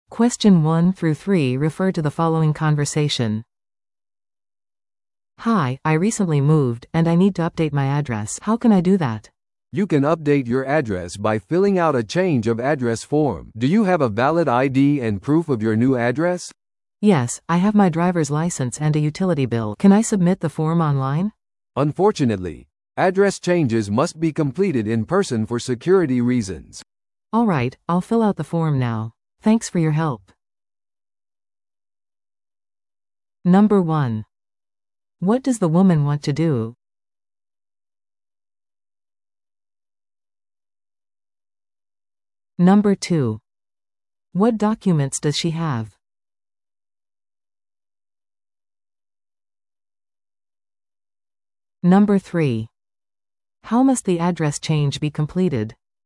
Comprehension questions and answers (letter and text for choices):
Listen to the audio below and answer the questions.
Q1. What does the woman want to do?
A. 新しい銀行口座を開設する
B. ローンを申し込む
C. 住所を更新する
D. 新しいデビットカードを依頼する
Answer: C. 住所を更新する

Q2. What documents does she have?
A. パスポートと給料明細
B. 運転免許証と公共料金の請求書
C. 賃貸契約書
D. 銀行取引明細書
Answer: B. 運転免許証と公共料金の請求書

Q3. How must the address change be completed?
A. 電話で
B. オンラインで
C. 対面で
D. 郵送で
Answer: C. 対面で

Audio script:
A: "Hi, I recently moved, and I need to update my address. How can I do that?"
B: "You can update your address by filling out a change-of-address form. Do you have a valid ID and proof of your new address?"
A: "Yes, I have my driver's license and a utility bill. Can I submit the form online?"
B: "Unfortunately, address changes must be completed in person for security reasons."
A: "Alright, I'll fill out the form now. Thanks for your help."